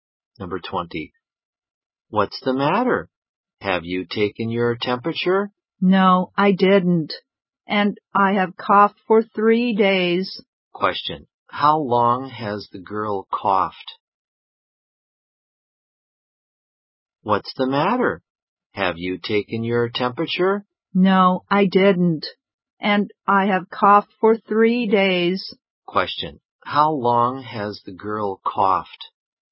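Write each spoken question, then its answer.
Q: How long has the girl coughed?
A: For 3 days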